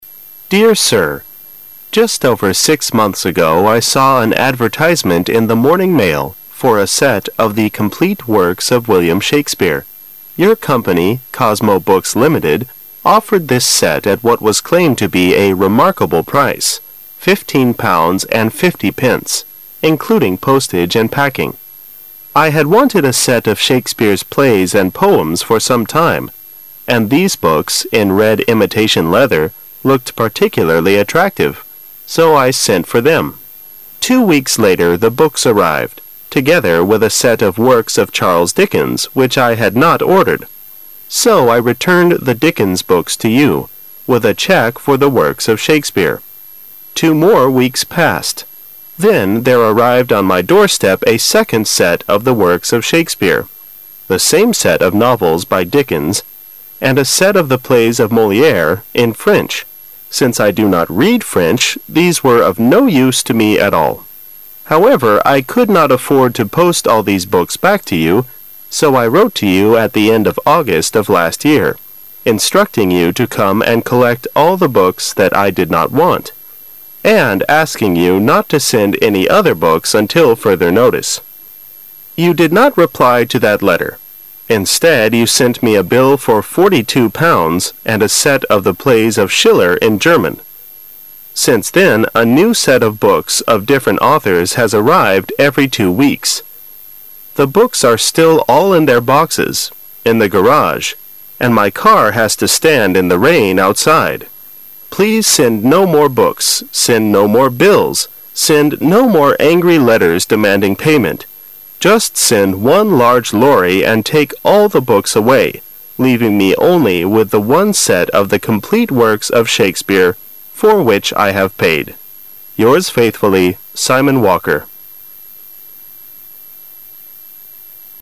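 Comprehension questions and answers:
For Questions 6-10,you will hear a letter of complaint. While you listen, complete the sentences and answer the questions. Use not more than 3 words for each answer. You will hear the recording twice. You now have 25 seconds to read the sentences and the questions below.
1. The writer of the letter saw the advertisement over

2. The price -- fifteen pounds and fifty pence--includes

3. What language is the set of the plays of Moliere in?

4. How much is the bill sent by the company to the author?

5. What are the angry letters sent by the company for?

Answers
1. six months ago
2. postage and packing
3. French
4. forty-two pounds
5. demanding payment

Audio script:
six months ago
[解析] 6-10 Dear Sir, Just over six months ago, I saw an advertisement in the Morning Mail for a set of the complete works of William Shakespeare. Your company, Cosmo Books Ltd, offered this set at what was claimed to be a "remarkable" price :fifteen-pounds and fifty pence, including postage and packing. 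I had wanted a set of Shakespeare's plays and poems for some time, and these books, in red imitation leather, looked particularly attractive; so I sent for them. Two weeks later, the books arrived, together with a set of works of Charles Dickens which I had not ordered, so I returned the Dickens books to you. with a check for the works of Shakespeare. Two more weeks passed. Then there arrived on my doorstep a second set of the works of Shakespeare, the same set of novels by Dickens and a set of the plays of Moliere, in French. Since I do not read French, these were of no use to me at all. However, I could not afford to post all these books back to you, so I wrote to you at the end of August of last year, instructing you to come and collect all the books that I did not want, and asking you not to send any other books until further notice. You did not reply to that letter. Instead you sent me a bill for forty-two pounds, and a set of the plays of Schiller, in German. 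Since then, a new set of books of different authors has arrived every two weeks. The books are still all in their boxes, in the garage, and my car has to stand in the rain outside. Please send no more books, send no more bills, send no more angry letters demanding payment. Just send one large lorry and take all the books away, leaving me only with the one set of the complete works of Shakespeare for which I have paid.
Yours faithfully, Simon Walker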